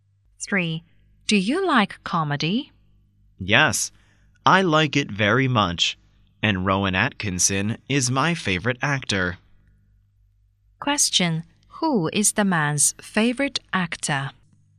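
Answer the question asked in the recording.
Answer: Rowan Atkinson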